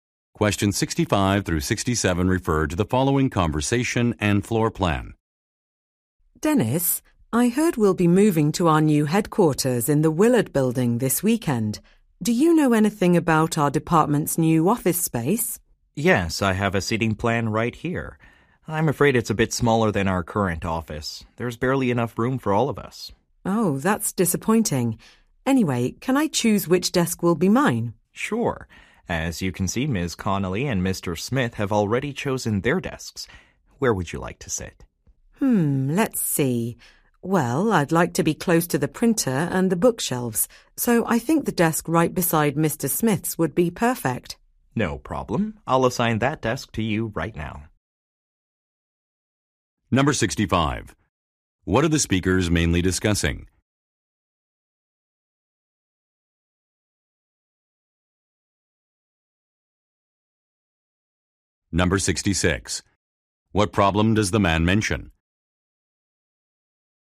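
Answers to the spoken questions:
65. Their new office space
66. The office is smaller than the current one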